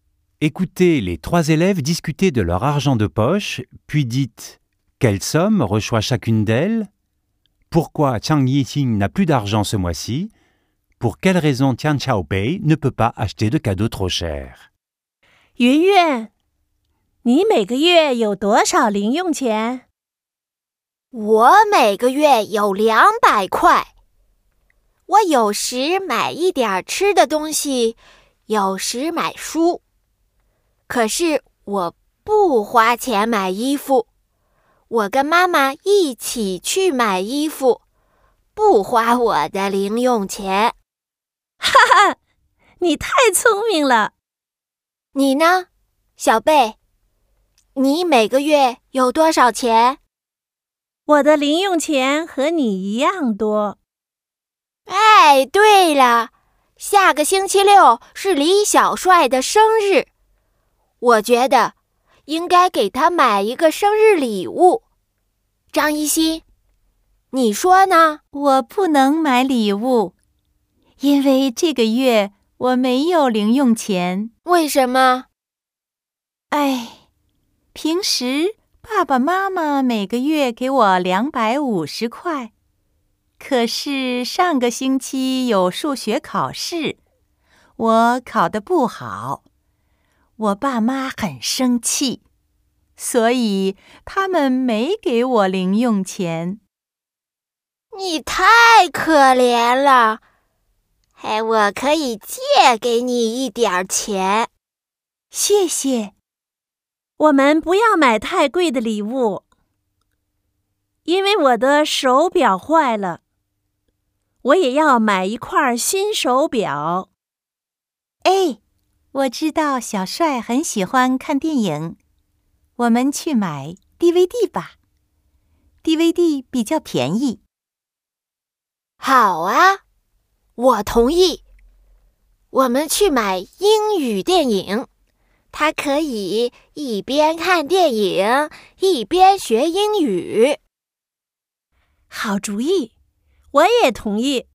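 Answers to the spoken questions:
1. Yunyun : 200 yuans par mois ; Xiaobei : 200 yuans aussi ; Zhang Yixing : normalement 250 yuans, mais rien ce mois-ci
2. Elle a raté son examen de maths et ses parents, fâchés, ne lui ont pas donné d'argent de poche
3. Sa montre est cassée et elle doit en acheter une nouvelle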